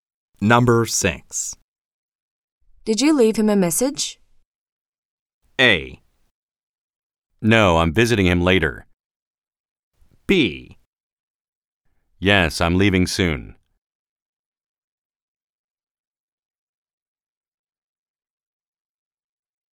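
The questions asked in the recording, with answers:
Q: Did you leave him a message?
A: A: No, I'm visiting him later.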